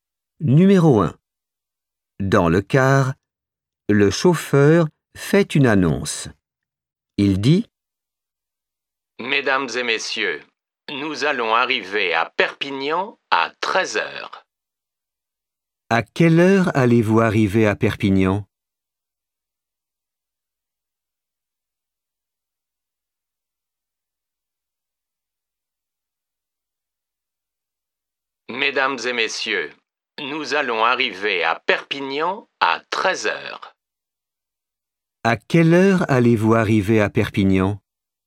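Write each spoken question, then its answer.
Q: À quelle heure allez-vous arriver à Perpignan?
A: À 13h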